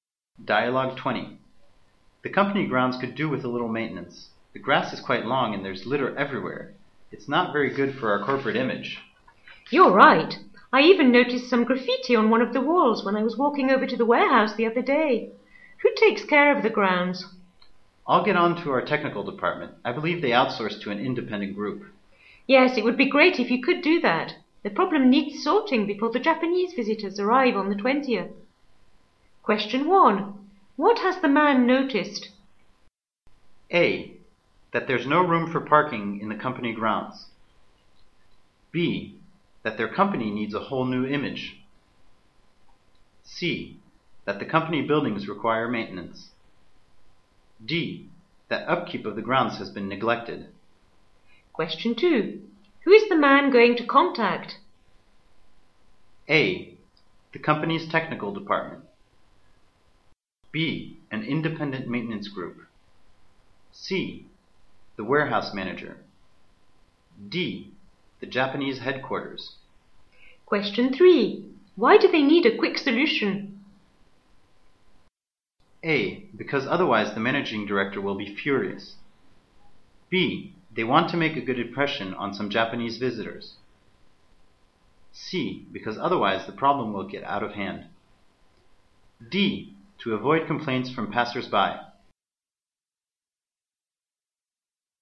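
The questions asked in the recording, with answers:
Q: What has the man noticed?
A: D: That upkeep of the grounds has been neglected.

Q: Who is the man going to contact?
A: A: The company's technical department.

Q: Why do they need a quick solution?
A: B: They want to make a good impression on some Japanese visitors.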